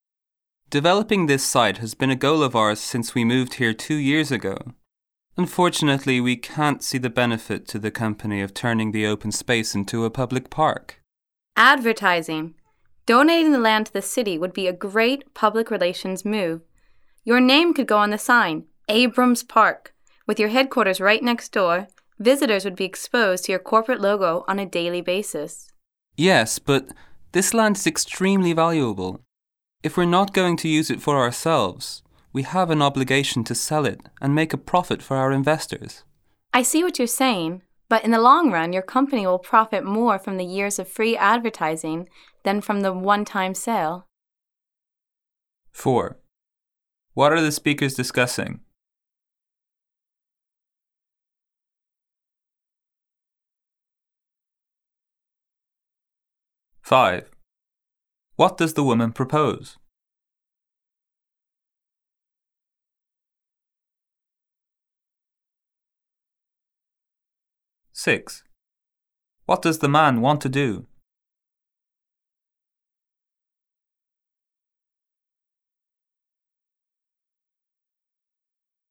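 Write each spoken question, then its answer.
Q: What are the speakers discussing?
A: What to do with a piece of company land: turning it into a public park

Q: What does the woman propose?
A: Donating the land to the city as a park named after the company

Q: What does the man want to do?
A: Sell the land to make a profit for investors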